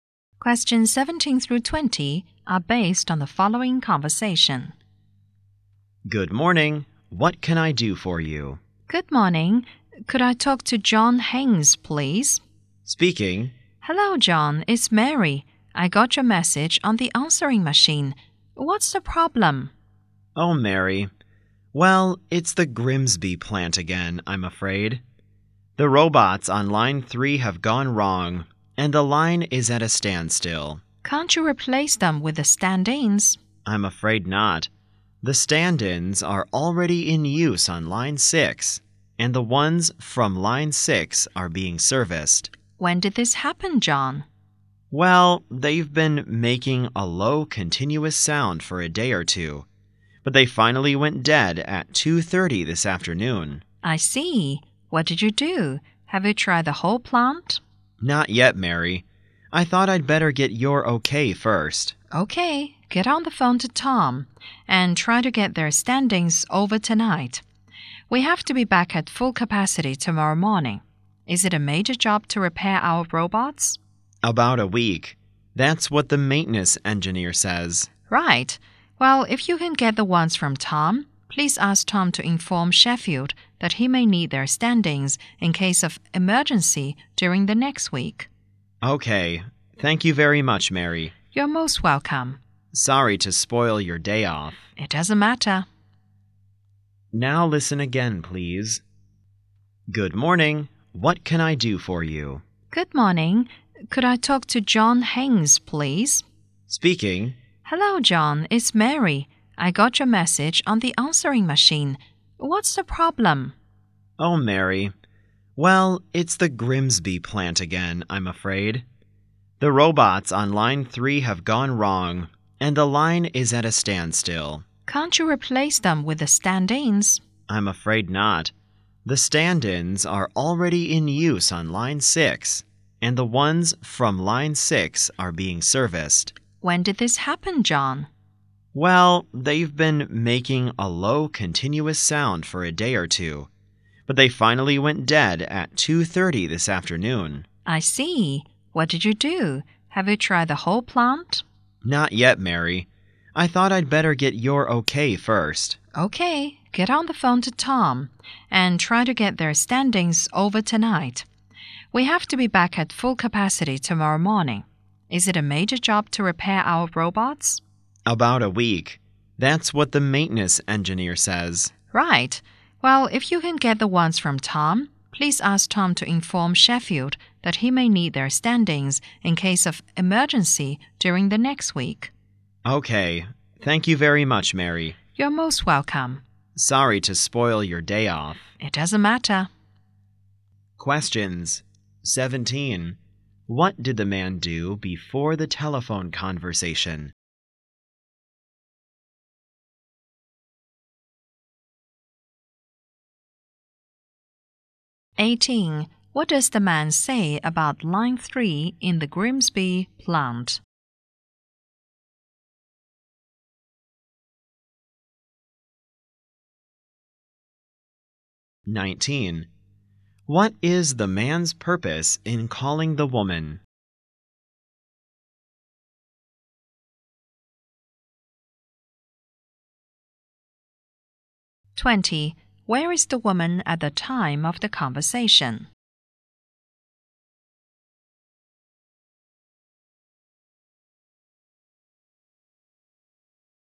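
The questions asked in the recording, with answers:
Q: What did the man do before the telephone conversation?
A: He left a message on the woman's answering machine

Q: What does the man say about line 3 in the Grimsby plant?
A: Its robots have gone wrong and the line is at a standstill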